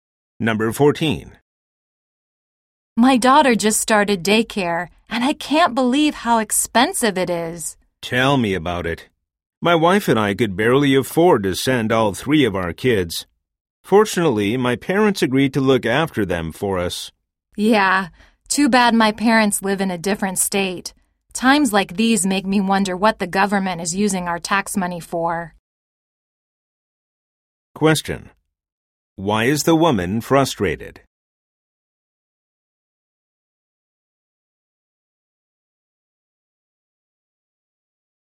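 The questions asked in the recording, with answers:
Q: Why is the woman frustrated?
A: Daycare is very expensive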